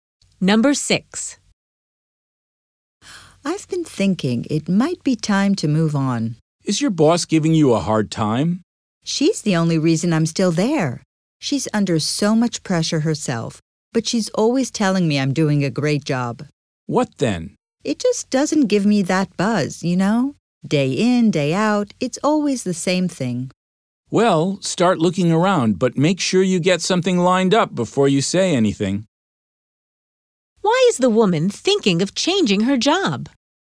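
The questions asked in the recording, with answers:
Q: Why is the woman thinking of changing her job?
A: Her job is boring and repetitive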